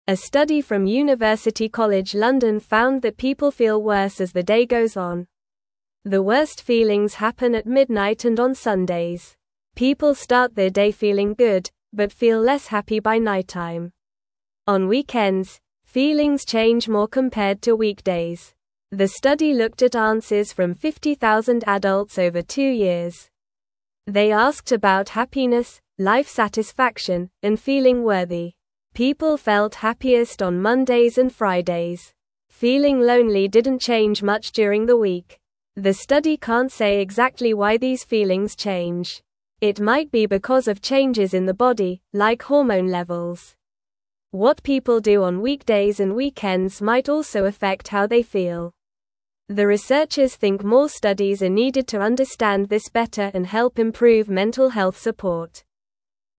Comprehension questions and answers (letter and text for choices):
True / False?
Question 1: The study asked 50,000 adults about their happiness and life satisfaction.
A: True

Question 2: People start their day feeling happy but feel less happy by nighttime.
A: True

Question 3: People feel happiest on Tuesdays and Thursdays.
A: False

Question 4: A study from University College London looked at how people feel during the day.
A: True

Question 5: People feel the worst at noon and on Saturdays.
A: False

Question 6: Feelings change more on weekends than on weekdays.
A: True

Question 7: Feeling lonely changes greatly throughout the week.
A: False

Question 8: The researchers do not want to do more studies to help understand feelings better.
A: False

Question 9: What did the study from University College London find about people's feelings during the day?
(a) People feel better as the day goes on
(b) People feel the same all day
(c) People feel happy only in the morning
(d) People feel worse as the day goes on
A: (d) People feel worse as the day goes on

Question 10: How many adults did the study look at?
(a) 10,000 adults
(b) 50,000 adults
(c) 25,000 adults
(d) 100,000 adults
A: (b) 50,000 adults

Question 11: On which days do people feel happiest?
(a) Mondays and Fridays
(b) Wednesdays and Thursdays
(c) Saturdays and Sundays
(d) Tuesdays and Saturdays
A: (a) Mondays and Fridays

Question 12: What feeling did not change much during the week?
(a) Feeling happy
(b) Feeling tired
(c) Feeling lonely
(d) Feeling excited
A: (c) Feeling lonely

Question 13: What might cause changes in feelings according to the study?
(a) Changes in the weather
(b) Changes in food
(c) Changes in the body, like hormone levels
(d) Changes in friends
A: (c) Changes in the body, like hormone levels

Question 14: What do the researchers think is needed to understand feelings better?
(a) More studies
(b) Less talking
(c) More games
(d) Fewer questions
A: (a) More studies

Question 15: What is one goal of the study?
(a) To make people feel worse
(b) To help improve mental health support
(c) To change people's jobs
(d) To make weekends longer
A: (b) To help improve mental health support

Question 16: How do people feel at the beginning of the day compared to the end of the day?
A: People feel good at the beginning of the day but less happy by the end of the day.

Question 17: On which days do people feel happiest, based on the study?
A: People feel happiest on Mondays and Fridays.

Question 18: How many adults were asked in the study?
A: The study asked 50,000 adults.

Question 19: What are some reasons the study gives for why feelings might change?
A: Feelings might change because of body changes, like hormones, or what people do on weekdays and weekends.

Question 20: What do the researchers want to do next to help understand feelings better?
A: The researchers want to do more studies to understand feelings better and help with mental health support.

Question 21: The (1)______ feelings happen at (2)______ and on Sundays.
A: worst

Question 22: The (1)______ feelings happen at (2)______ and on Sundays.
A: midnight

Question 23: People start their day feeling (3)______, but feel less happy by nighttime.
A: good

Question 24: On (4)______, feelings change more compared to weekdays.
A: weekends

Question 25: The study looked at answers from 50,000 adults over two (5)______.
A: years

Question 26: They asked about happiness, life (6)______, and feeling worthy.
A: satisfaction

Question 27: People felt happiest on (7)______ and Fridays.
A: Mondays

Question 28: Feeling lonely didn't change much during the (8)______.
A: week

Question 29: The (9)______ can't say exactly why these feelings change.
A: study

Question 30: It might be because of changes in the body, like hormone (10)______.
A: levels

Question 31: What people do on weekdays and weekends might also affect how they (11)______.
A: feel

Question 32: The researchers (12)______ more studies are needed to understand this better and help improve mental health support.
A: think

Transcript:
A study from University College London found that people feel worse as the day goes on. The worst feelings happen at midnight and on Sundays. People start their day feeling good, but feel less happy by nighttime. On weekends, feelings change more compared to weekdays.
The study looked at answers from 50,000 adults over two years. They asked about happiness, life satisfaction, and feeling worthy. People felt happiest on Mondays and Fridays. Feeling lonely didn't change much during the week.
The study can't say exactly why these feelings change. It might be because of changes in the body, like hormone levels. What people do on weekdays and weekends might also affect how they feel. The researchers think more studies are needed to understand this better and help improve mental health support.

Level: Level 2